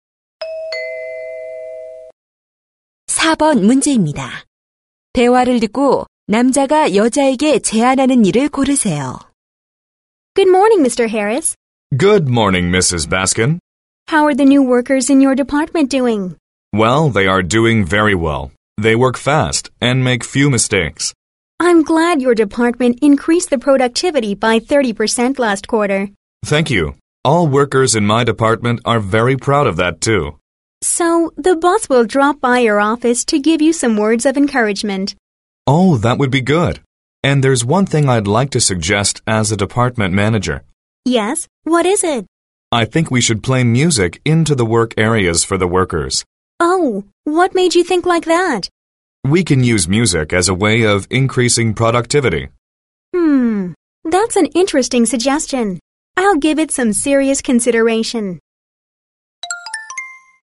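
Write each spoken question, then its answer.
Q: 대화를 듣고 남자가 여자에게 제안하는 일을 고르세요.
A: 작업 공간에 음악을 틀어 주기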